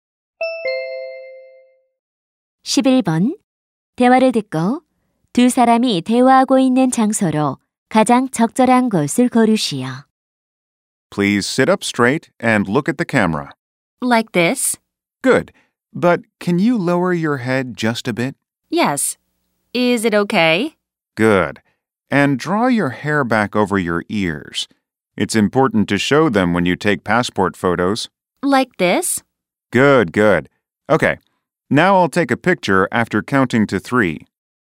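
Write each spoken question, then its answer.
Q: 대화를 듣고 두 사람이 대화하고 있는 장소로 가장 적절한 곳을 고르시오.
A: 사진관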